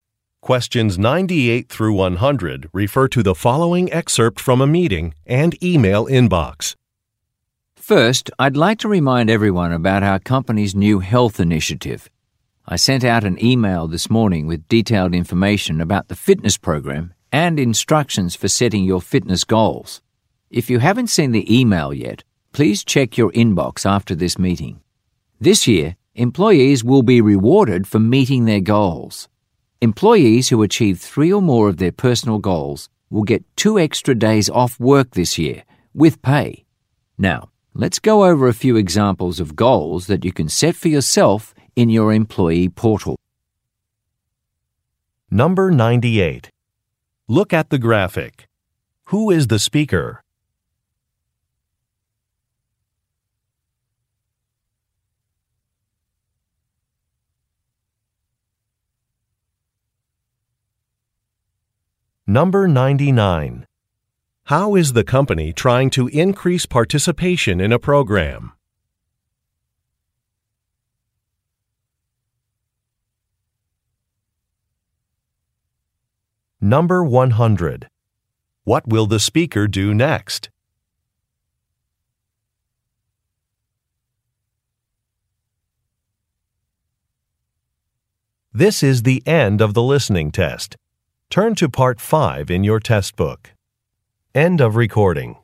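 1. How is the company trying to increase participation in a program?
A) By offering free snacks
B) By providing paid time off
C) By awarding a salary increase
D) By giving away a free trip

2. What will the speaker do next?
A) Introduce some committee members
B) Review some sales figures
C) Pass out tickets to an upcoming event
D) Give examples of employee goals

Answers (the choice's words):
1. By providing paid time off
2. Give examples of employee goals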